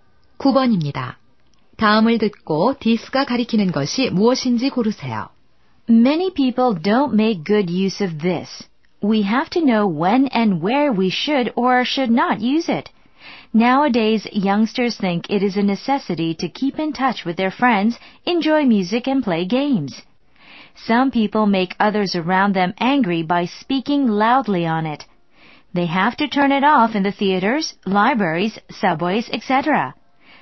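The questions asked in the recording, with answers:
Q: 다음을 듣고 디스가 가리키는 것이 무엇인지 고르세요.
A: 휴대전화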